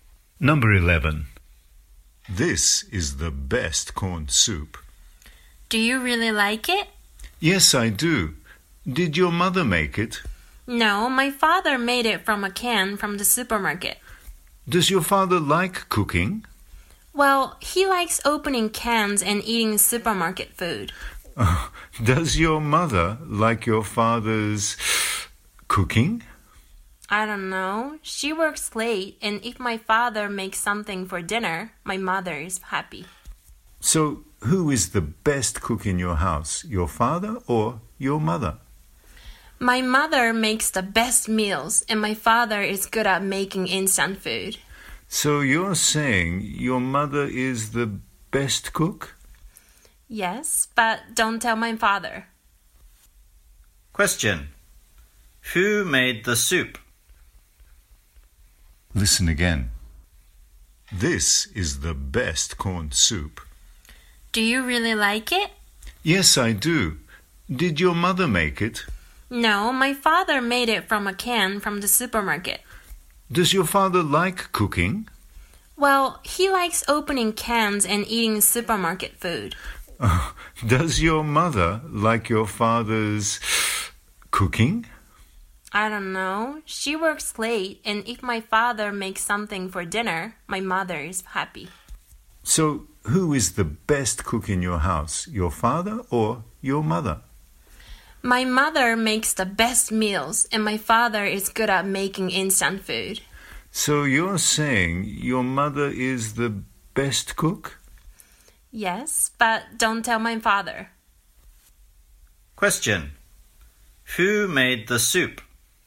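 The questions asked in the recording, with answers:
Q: Who made the soup?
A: The father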